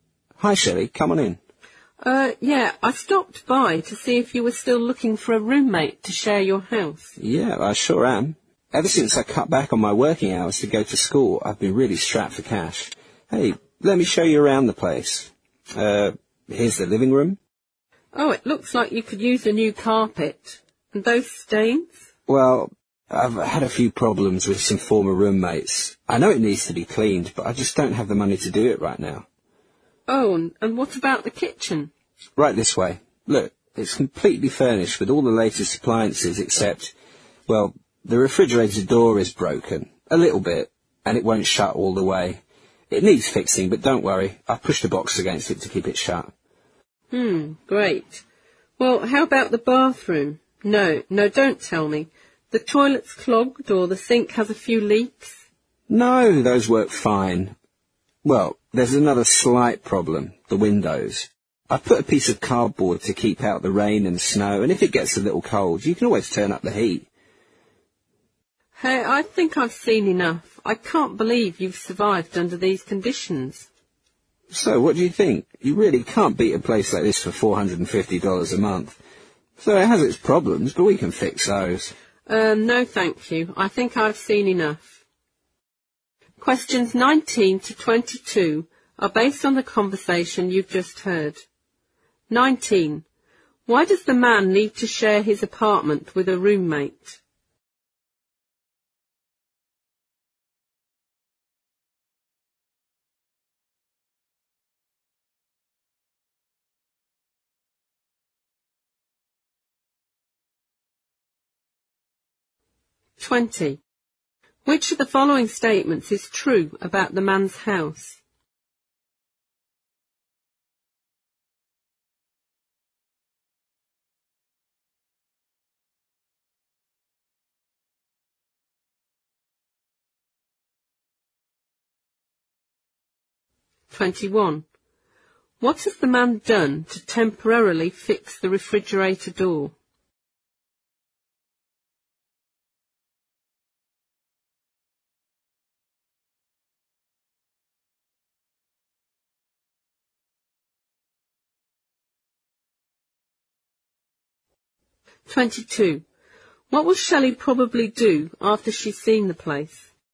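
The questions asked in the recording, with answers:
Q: Why does the man need to share his apartment with a roommate?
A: He cut back his working hours to go to school and is short of money

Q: What has the man done to temporarily fix the refrigerator door?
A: He pushed a box against it

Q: What will Shelley probably do after she's seen the place?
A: She won't rent it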